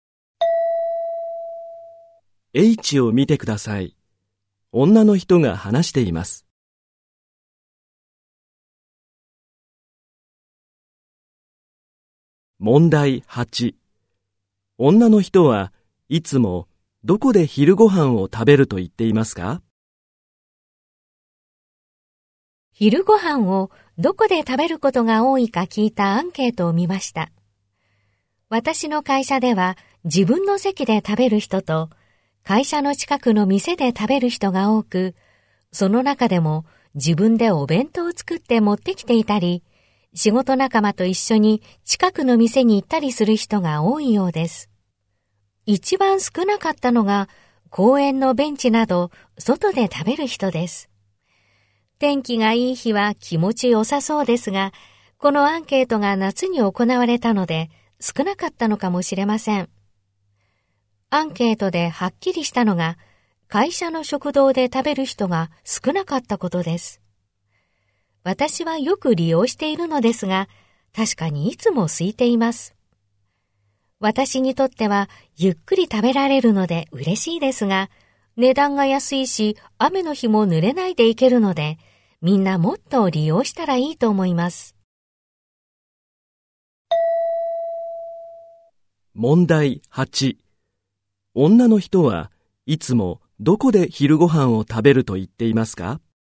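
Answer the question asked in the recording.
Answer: 会社の食堂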